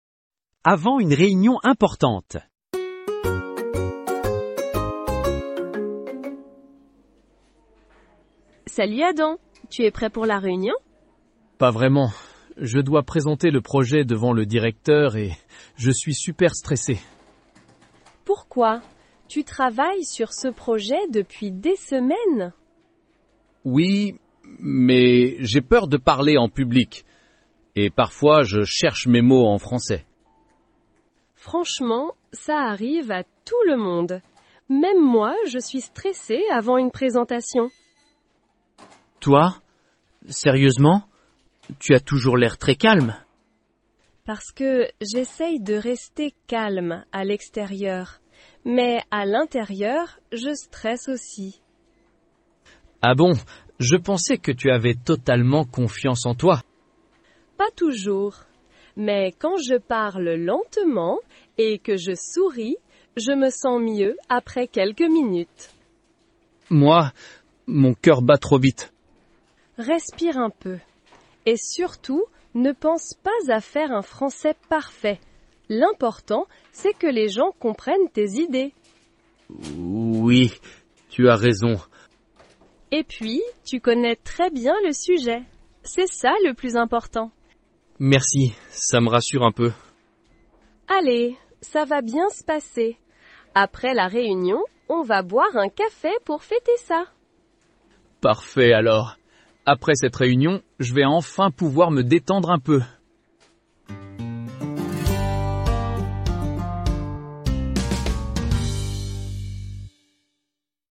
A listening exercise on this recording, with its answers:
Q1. Pourquoi Adam n'est-il pas vraiment prêt pour la réunion ?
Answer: Parce qu'il est très stressé.

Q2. Que doit faire Adam pendant la réunion ?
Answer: Il doit présenter le projet devant le directeur.

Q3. Depuis combien de temps Adam travaille-t-il sur ce projet ?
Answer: Depuis des semaines.

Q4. Pourquoi Adam a-t-il peur de parler en public ?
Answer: Parce qu'il cherche parfois ses mots en français.

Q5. Est-ce que Nina comprend le stress d'Adam ?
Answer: Oui, elle dit que ça arrive à tout le monde.

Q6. Pourquoi Adam est-il surpris quand Nina dit qu'elle est stressée ?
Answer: Parce qu'elle a toujours l'air très calme.

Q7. Comment Nina essaie-t-elle de rester calme ?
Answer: Elle parle lentement et elle sourit.

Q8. Quel conseil Nina donne-t-elle à Adam pour son français ?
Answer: Elle lui conseille de ne pas chercher un français parfait.

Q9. Selon Nina, qu'est-ce qui est plus important que parler parfaitement ?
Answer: Que les gens comprennent ses idées.

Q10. Que propose Nina après la réunion ?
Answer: Elle propose d'aller boire un café pour fêter ça.

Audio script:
Avant une réunion importante
Nina : Salut Adam, tu es prêt pour la réunion ?
Adam : Pas vraiment... Je dois présenter le projet devant le directeur et je suis super stressé.
Nina : Pourquoi ? Tu travailles sur ce projet depuis des semaines.
Adam : Oui, mais j'ai peur de parler en public. Et parfois, je cherche mes mots en français.
Nina : Franchement, ça arrive à tout le monde. Même moi, je suis stressée avant une présentation.
Adam : Toi ? Sérieusement ? Tu as toujours l'air très calme.
Nina : Parce que j'essaie de rester calme à l'extérieur. Mais à l'intérieur, je stresse aussi.
Adam : Ah bon... je pensais que tu avais totalement confiance en toi.
Nina : Pas toujours. Mais quand je parle lentement et que je souris, je me sens mieux après quelques minutes.
Adam : Moi, mon cœur bat trop vite.
Nina : Respire un peu. Et surtout, ne pense pas à faire un français parfait. L'important, c'est que les gens comprennent tes idées.
Adam : Oui... tu as raison.
Nina : Et puis, tu connais très bien le sujet. C'est ça le plus important.
Adam : Merci, ça me rassure un peu.
Nina : Allez, ça va bien se passer. Après la réunion, on va boire un café pour fêter ça !
Adam : Parfait alors ! Après cette réunion, je vais enfin pouvoir me détendre un peu.

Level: niveau A2-B1